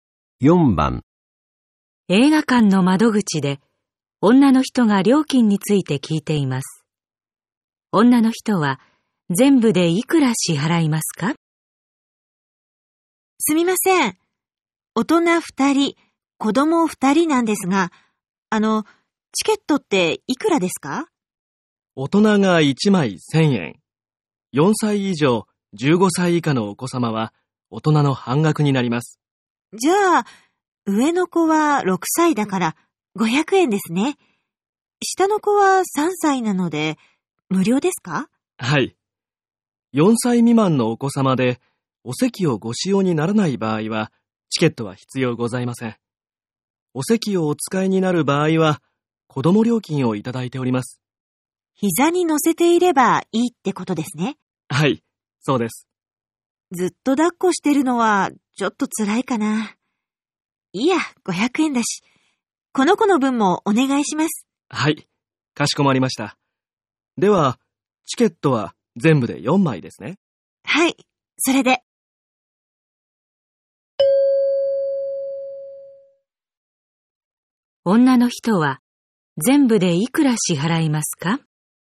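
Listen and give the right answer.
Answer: 3000円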